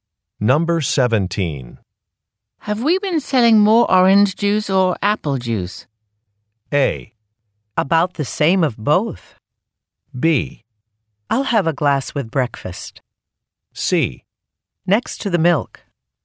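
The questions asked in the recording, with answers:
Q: Have we been selling more orange juice or apple juice?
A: A: About the same of both.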